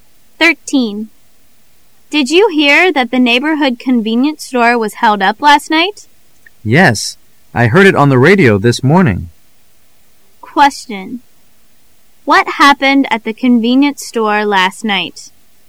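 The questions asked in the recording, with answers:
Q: What happened at the convenience store last night?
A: It was robbed (held up)

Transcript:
[解析] W: Did you hear that the neighborhood convenience store was held up last night? M: Yes, I heard it on the radio this morning. Q: What happened at the convenience store last night?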